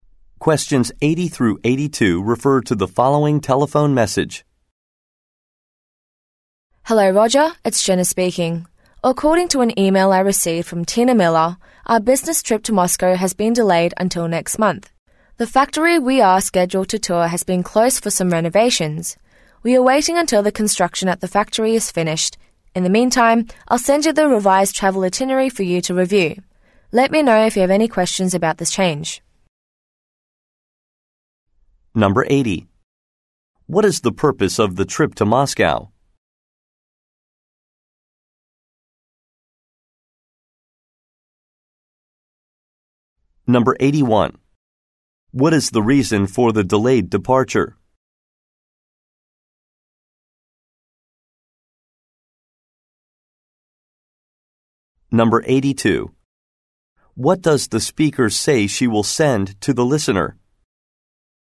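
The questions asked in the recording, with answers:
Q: What is the purpose of the trip to Moscow?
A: To tour a factory

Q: What is the reason for the delayed departure?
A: The factory is closed for renovations

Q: What does the speaker say she will send to the listener?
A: A revised travel itinerary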